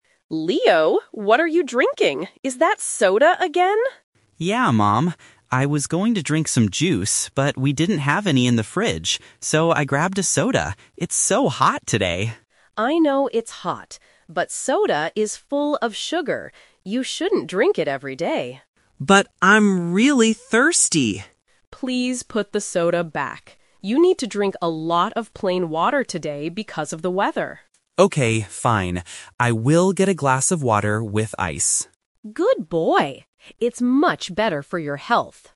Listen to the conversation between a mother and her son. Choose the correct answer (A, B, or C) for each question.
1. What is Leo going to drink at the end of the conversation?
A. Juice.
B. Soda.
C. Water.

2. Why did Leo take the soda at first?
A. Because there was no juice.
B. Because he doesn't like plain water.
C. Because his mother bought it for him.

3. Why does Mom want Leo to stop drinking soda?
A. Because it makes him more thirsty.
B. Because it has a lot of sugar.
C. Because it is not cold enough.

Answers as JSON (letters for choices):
{"1": "C", "2": "A", "3": "B"}

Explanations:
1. At the end, Leo agrees with his mom and says, "I will get a glass of water with ice." Option (B) is a trap; he grabbed the soda first but his mom told him to put it back. Option (A) is also a trap; juice was his original plan, but they didn't have any.
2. Leo clearly states, "I was going to drink some juice, but we didn't have any in the fridge. So I grabbed a soda." Option (B) is a plausible reason for a kid, but it is never mentioned. Option (C) is incorrect and not mentioned.
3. Mom tells him to put it back because "soda is full of sugar." Option (A) is a plausible fact about sugary drinks but is not mentioned in the audio. Option (C) is a trap; they mention hot weather and ice, but the temperature of the soda is not the reason she stops him.

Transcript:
Mom: Leo, what are you drinking? Is that soda again?
Leo: Yeah, mom. I was going to drink some juice, but we didn't have any in the fridge. So I grabbed a soda. It's so hot today!
Mom: I know it's hot, but soda is full of sugar. You shouldn't drink it every day.
Leo: But I'm really thirsty!
Mom: Please put the soda back. You need to drink a lot of plain water today because of the weather.
Leo: Okay, fine. I will get a glass of water with ice.